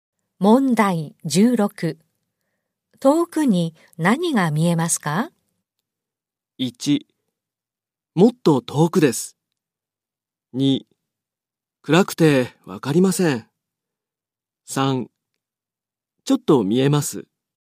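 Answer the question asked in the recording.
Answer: 2: 暗くてわかりません。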